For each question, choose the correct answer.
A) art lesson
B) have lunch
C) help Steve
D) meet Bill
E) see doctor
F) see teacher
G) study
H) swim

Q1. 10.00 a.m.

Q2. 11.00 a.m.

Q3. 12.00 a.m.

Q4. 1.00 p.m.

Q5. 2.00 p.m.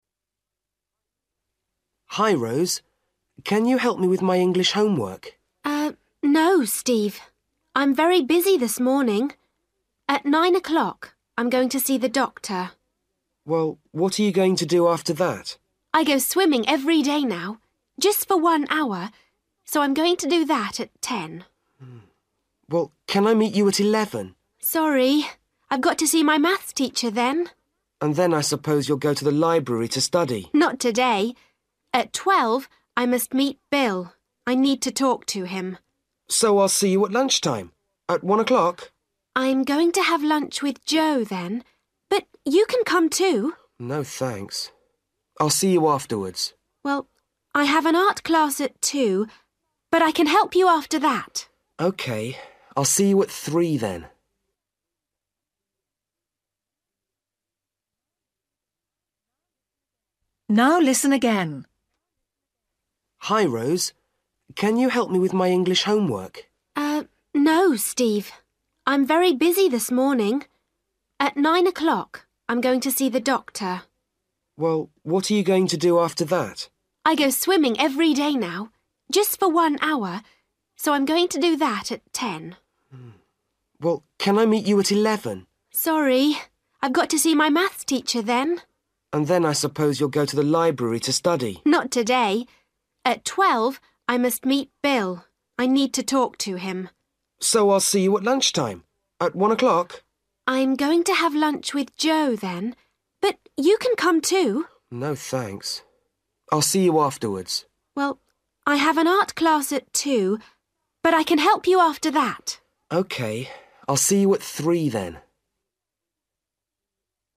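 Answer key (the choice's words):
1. swim
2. see teacher
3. meet Bill
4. have lunch
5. art lesson

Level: Luyện nghe trình độ A2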